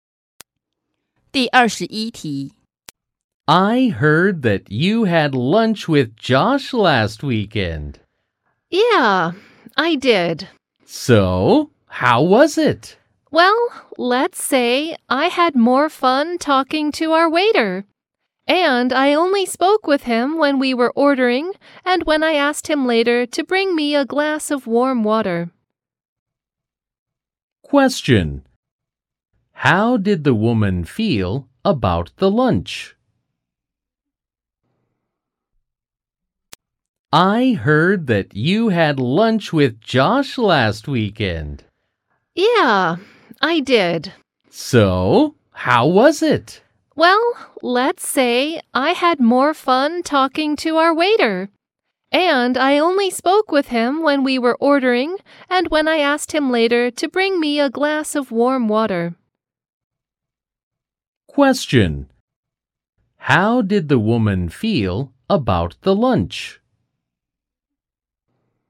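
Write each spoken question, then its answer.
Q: How did the woman feel about the lunch?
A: It was boring; she didn't enjoy it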